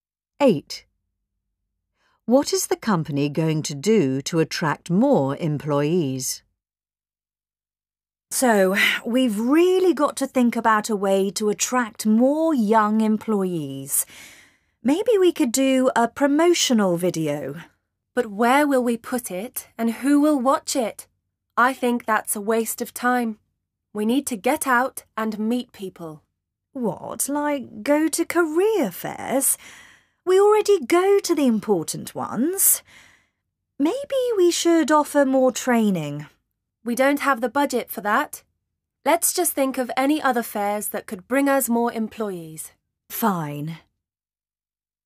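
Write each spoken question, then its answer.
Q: What is the company going to do to attract more employees?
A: Go to more career fairs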